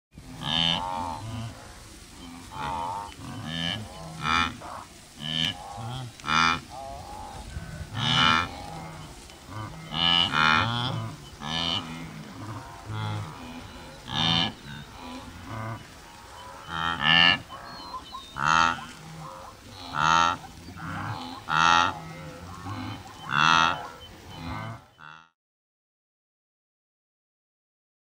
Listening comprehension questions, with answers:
True or False: Only cows make mooing sounds.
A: False! Wildebeest moo, too!

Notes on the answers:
These creatures have a wide array of noisy vocalizations, from basic moos to explosive snorts. They'll use these sounds to assert dominance, get attention from females and let other wildebeest know when a river is safe to cross.